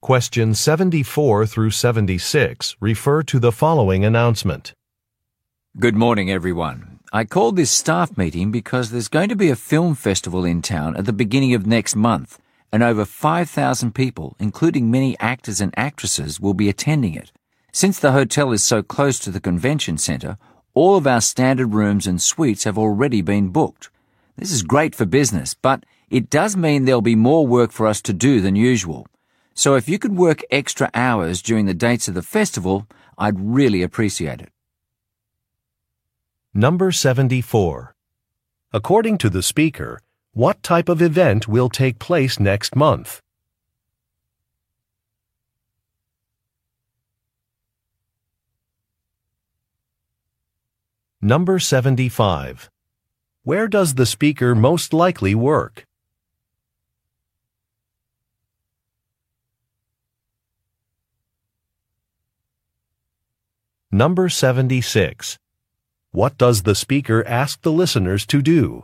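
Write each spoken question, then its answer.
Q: According to the speaker, what type of event will take place next month?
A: A film festival

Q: Where does the speaker most likely work?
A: At a hotel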